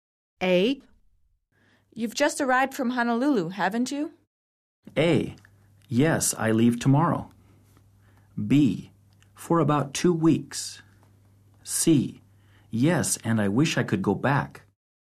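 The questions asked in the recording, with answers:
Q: You've just arrived from Honolulu, haven't you?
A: C: Yes, and I wish I could go back.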